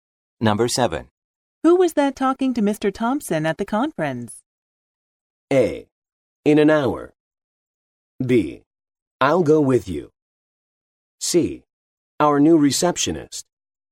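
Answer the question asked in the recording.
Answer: C: Our new receptionist.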